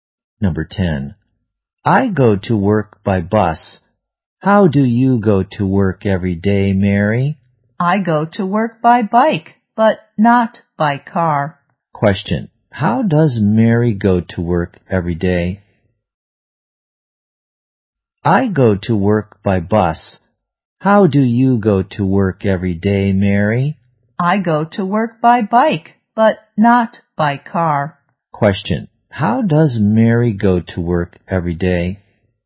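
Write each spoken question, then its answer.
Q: how does Mary go to work every day?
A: By bike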